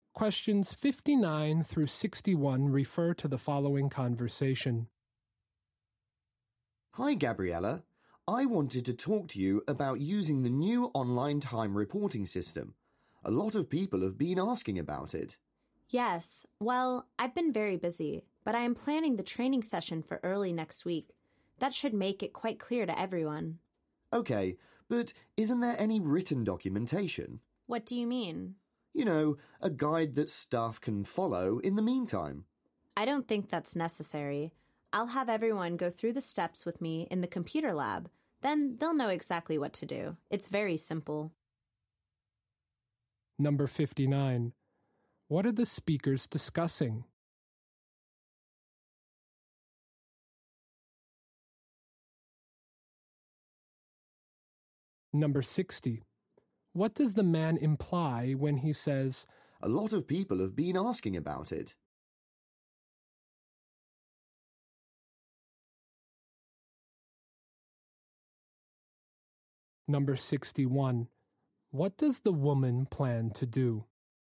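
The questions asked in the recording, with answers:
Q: What are the speakers discussing?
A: A new online time reporting system

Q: What does the woman plan to do?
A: Hold a training session in the computer lab early next week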